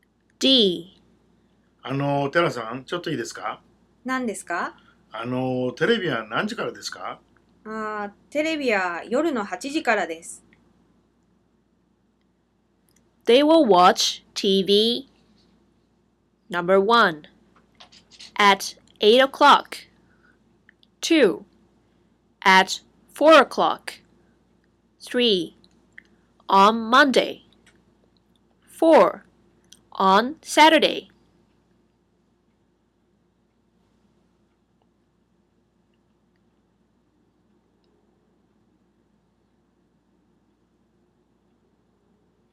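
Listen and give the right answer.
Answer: 1: At 8 o'clock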